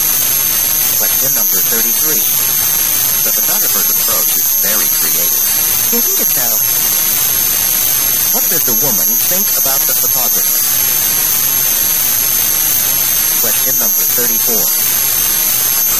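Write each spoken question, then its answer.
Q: What does the woman think about the photographer?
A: She agrees he is very creative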